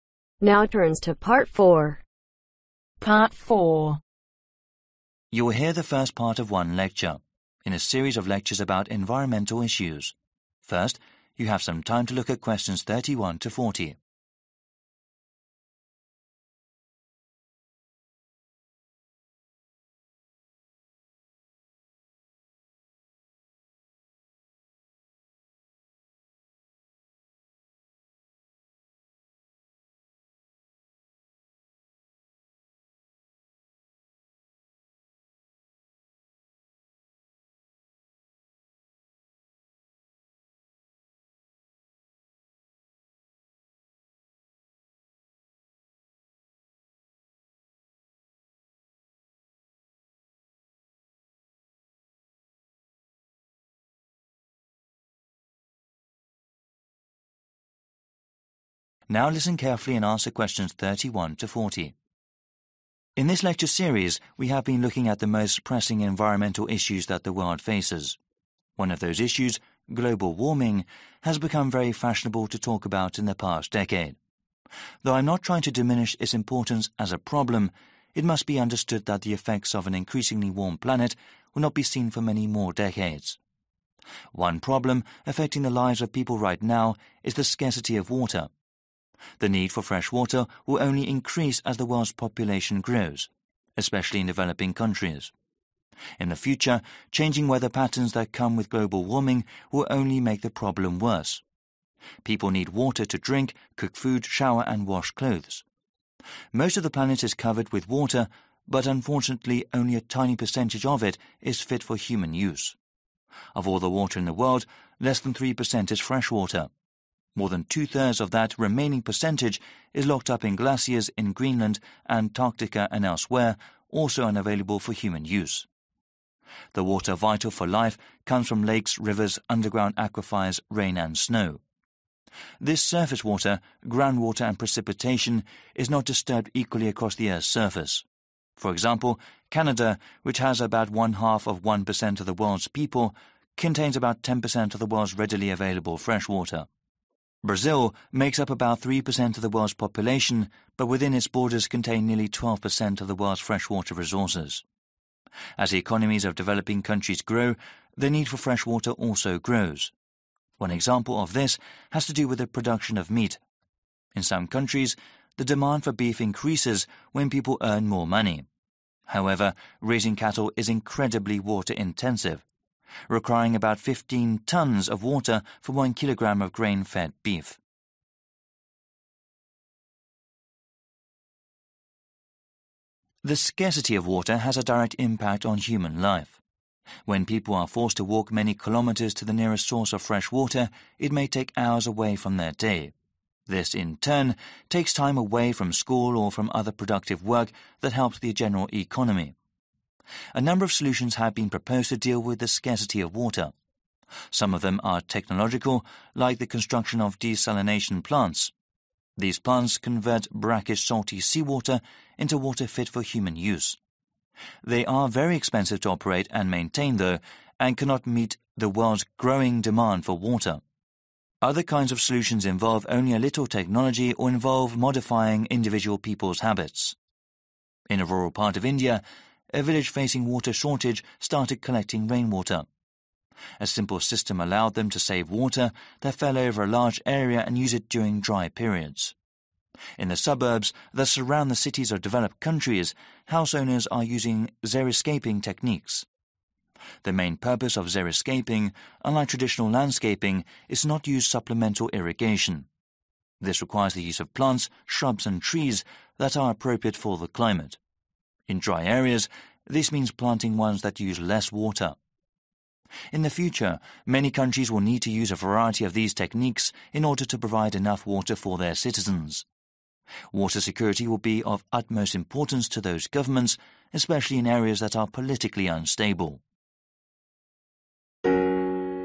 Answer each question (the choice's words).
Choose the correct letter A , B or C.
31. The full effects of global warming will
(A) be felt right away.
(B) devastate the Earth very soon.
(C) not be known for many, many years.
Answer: not be known for many, many years.

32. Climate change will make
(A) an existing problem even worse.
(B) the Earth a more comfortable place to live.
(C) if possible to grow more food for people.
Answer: an existing problem even worse.

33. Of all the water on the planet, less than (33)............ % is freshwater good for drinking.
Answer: 3/Three

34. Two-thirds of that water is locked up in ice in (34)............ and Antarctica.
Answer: Greenland

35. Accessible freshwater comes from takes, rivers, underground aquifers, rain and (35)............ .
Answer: Snow

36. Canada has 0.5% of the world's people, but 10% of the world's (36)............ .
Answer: Freshwater

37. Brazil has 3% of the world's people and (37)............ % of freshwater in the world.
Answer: 12/twelve

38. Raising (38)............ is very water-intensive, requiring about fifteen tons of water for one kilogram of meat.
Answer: Cattle

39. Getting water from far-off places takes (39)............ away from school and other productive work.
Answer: Time

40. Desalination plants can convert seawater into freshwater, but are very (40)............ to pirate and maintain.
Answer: Expensive